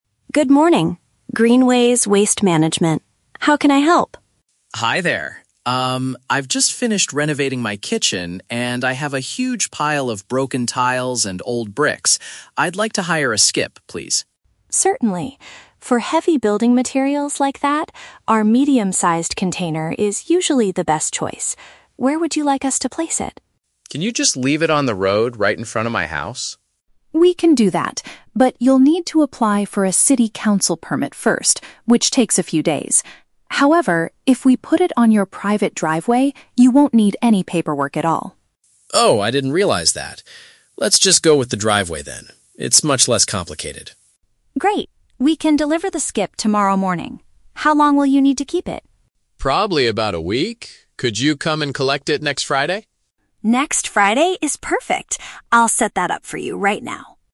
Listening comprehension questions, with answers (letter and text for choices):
Listen to the telephone conversation between a homeowner and a waste management employee, then choose the correct answer (A, B, or C) for each question.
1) What kind of rubbish does the man want to throw away?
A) Old furniture from his living room.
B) Heavy construction debris.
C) Leftover paint and chemical liquids.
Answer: B) Heavy construction debris.

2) Where will the waste container be placed eventually?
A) On his personal parking area.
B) On the public street outside his home.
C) In his backyard garden.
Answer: A) On his personal parking area.

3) When is the company going to take the skip away?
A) Tomorrow morning.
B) In exactly three days.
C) At the end of next week.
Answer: C) At the end of next week.

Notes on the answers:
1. Mark says he has a pile of "broken tiles and old bricks," and Sarah refers to them as "heavy building materials." Option (B) uses the paraphrase "construction debris." Options (A) and (C) are plausible things to throw away after a renovation, but they are never mentioned in the audio.
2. Mark originally wants it on the road, but changes his mind to avoid paperwork and says, "Let's just go with the driveway then." Option (A) paraphrases "private driveway" as "personal parking area." Option (B) is a trap; the "road right in front of my house" is his initial request, but it is rejected. Option (C) is not mentioned.
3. Mark asks if they can "collect it next Friday," and Sarah agrees. "Next Friday" is paraphrased as "at the end of next week." Option (A) is a trap; "tomorrow morning" is when the company will deliver the skip, not take it away. Option (B) is a trap; "a few days" is mentioned regarding the time needed to get a permit, not the collection date.

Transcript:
Sarah: Good morning, Greenways Waste Management. How can I help?
Mark: Hi there. Um, I've just finished renovating my kitchen, and I have a huge pile of broken tiles and old bricks. I'd like to hire a skip, please.
Sarah: Certainly. For heavy building materials like that, our medium-sized container is usually the best choice. Where would you like us to place it?
Mark: Can you just leave it on the road right in front of my house?
Sarah: We can do that, but you'll need to apply for a city council permit first, which takes a few days. However, if we put it on your private driveway, you won't need any paperwork at all.
Mark: Oh, I didn't realize that. Let's just go with the driveway then. It's much less complicated.
Sarah: Great. We can deliver the skip tomorrow morning. How long will you need to keep it?
Mark: Probably about a week. Could you come and collect it next Friday?